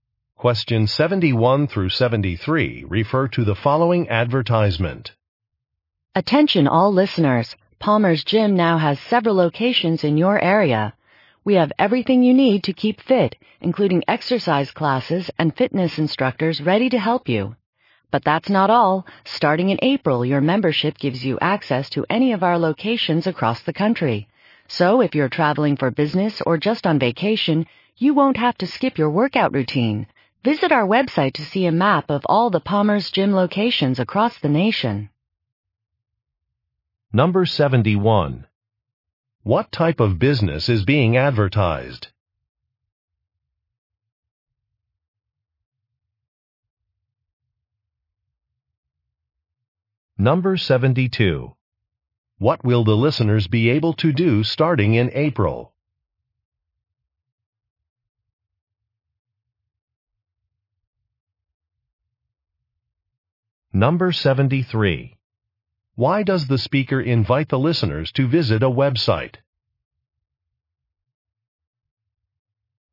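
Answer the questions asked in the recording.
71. A gym
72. Use any of the gym's locations across the country
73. To see a map of all the gym locations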